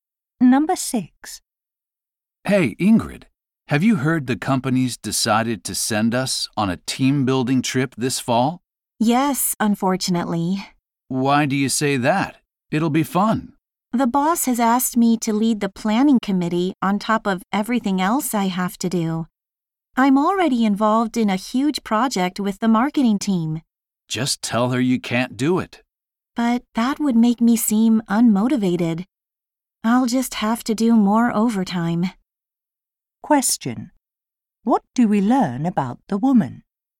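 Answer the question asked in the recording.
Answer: She has been given extra work planning the trip and will do more overtime.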